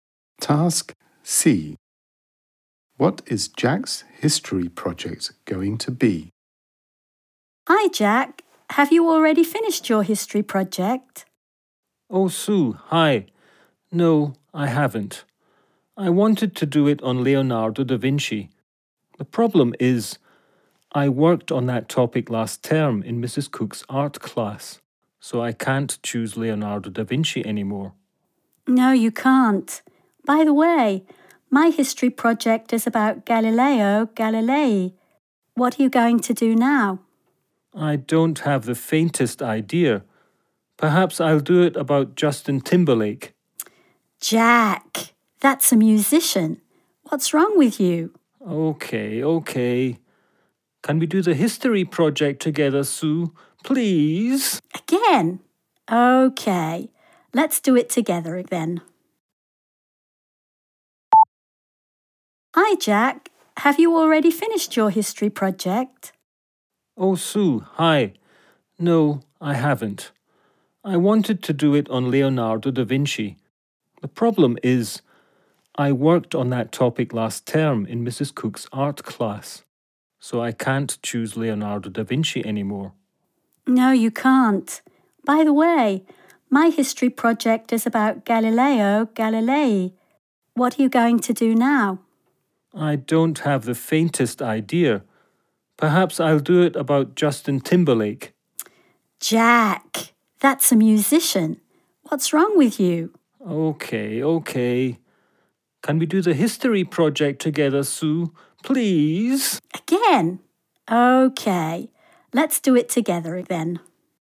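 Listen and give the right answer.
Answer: Galileo Galilei, done together with Sue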